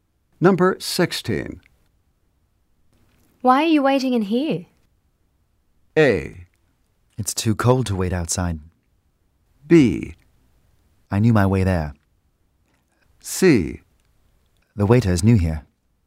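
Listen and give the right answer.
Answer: A: It's too cold to wait outside.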